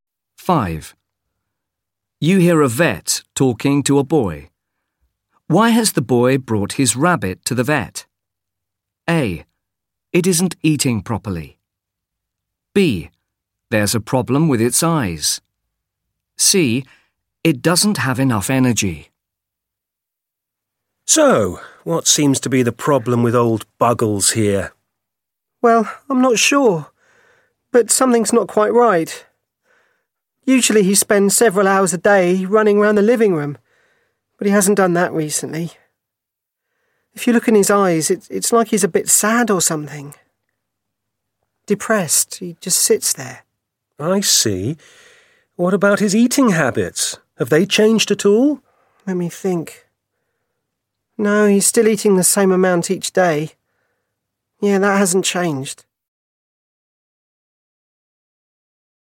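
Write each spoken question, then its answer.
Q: Why has the boy brought his rabbit to the vet?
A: C: It doesn't have enough energy.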